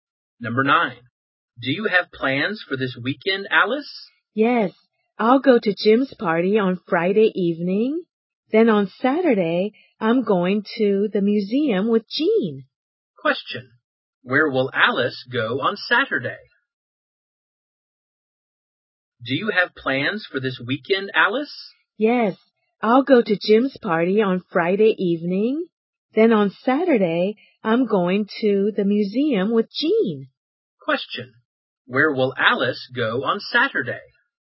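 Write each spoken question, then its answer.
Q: Where will Alice go on Saturday?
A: The museum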